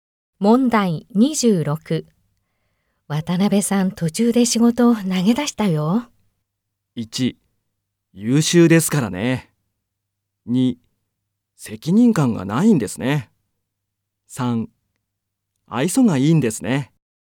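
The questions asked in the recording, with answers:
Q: 渡辺さん、途中で仕事を投げ出したよ。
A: 2: 責任感がないんですね。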